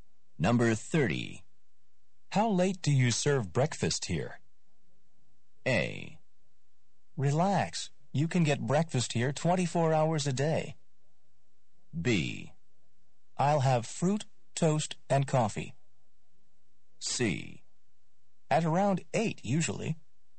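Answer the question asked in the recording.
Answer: A: Relax. You can get breakfast here 24 hours a day.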